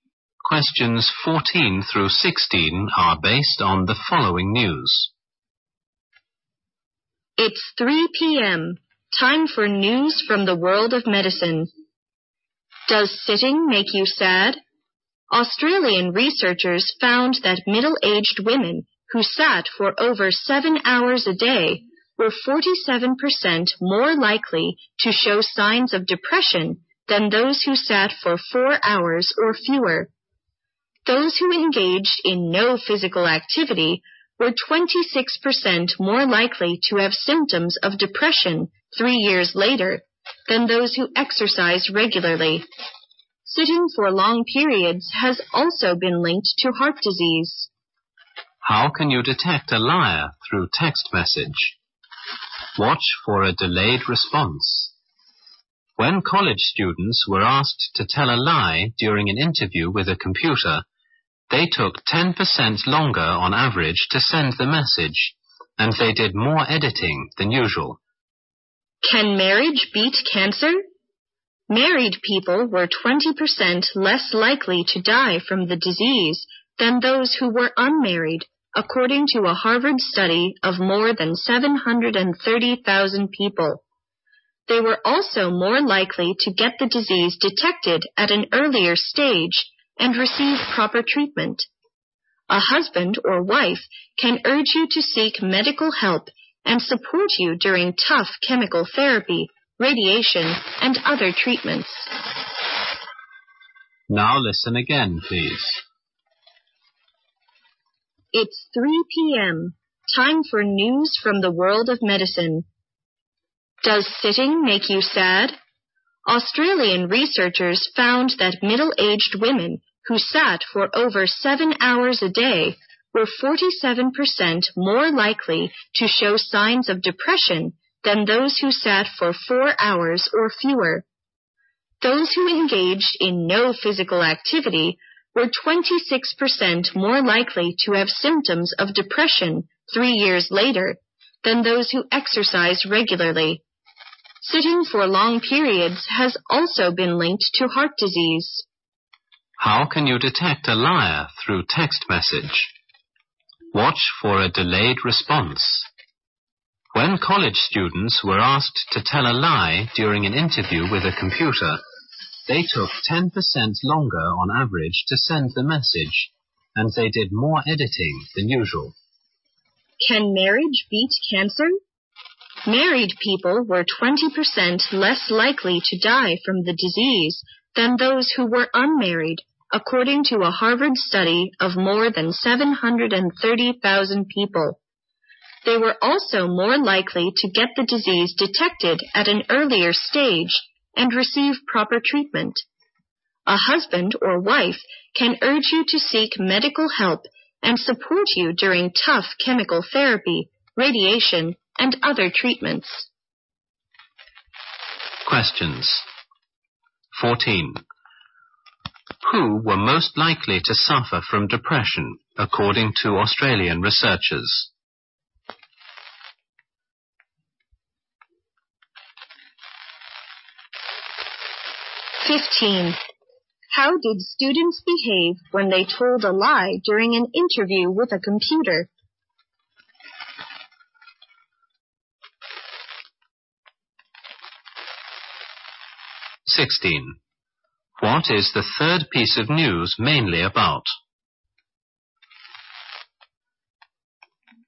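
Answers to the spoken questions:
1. Middle-aged women who sat for over 7 hours a day
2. They took longer to send messages and did more editing
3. Marriage helps people fight cancer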